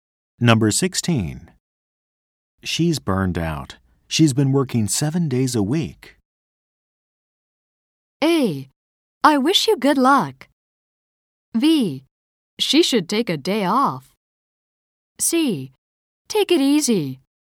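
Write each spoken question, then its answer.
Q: She's burned out. She's been working 7 days a week.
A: B: She should take a day off.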